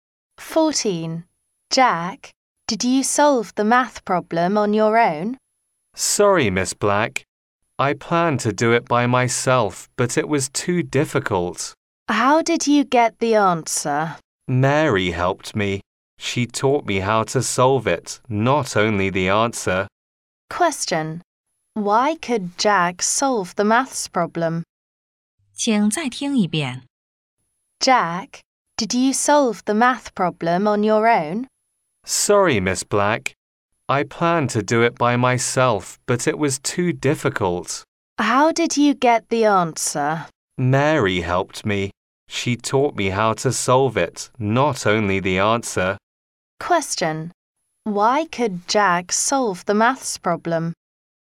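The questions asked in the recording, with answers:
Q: Why could Jack solve the maths problem?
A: Because Mary taught him how to solve it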